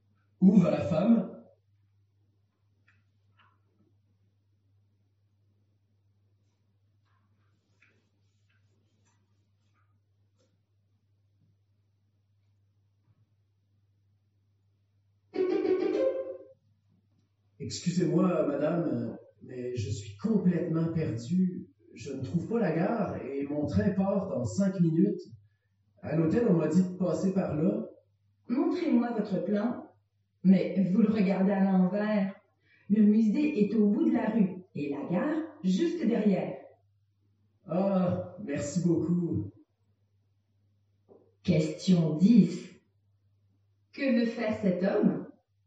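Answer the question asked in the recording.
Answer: Aller à la gare pour prendre son train.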